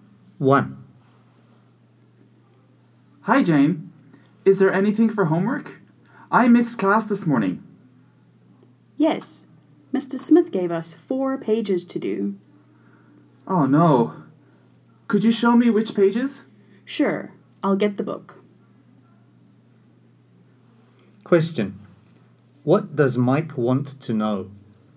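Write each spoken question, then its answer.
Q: What does Mike want to know?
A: Which pages of homework to do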